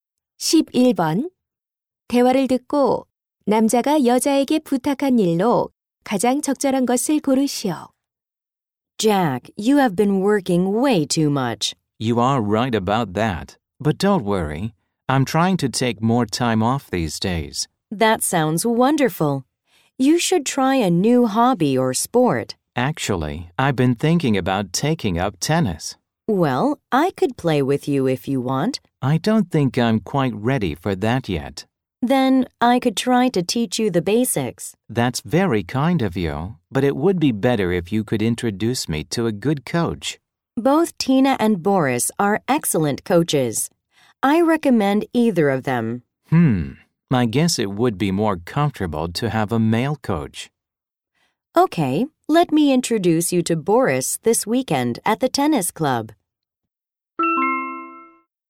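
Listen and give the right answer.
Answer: 좋은 테니스 코치 소개해 주기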